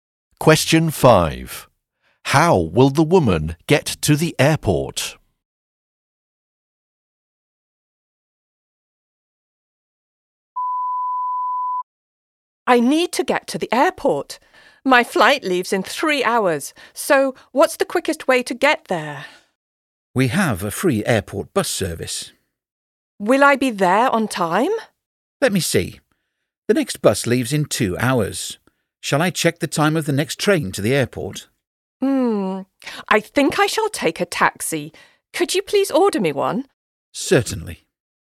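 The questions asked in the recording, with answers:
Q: How will the woman get to the airport?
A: By taxi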